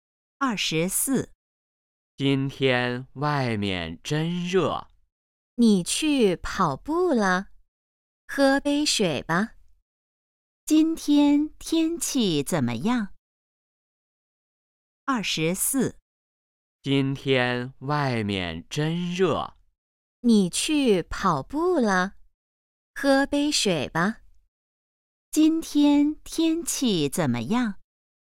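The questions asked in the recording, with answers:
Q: 今天天气怎么样?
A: 很热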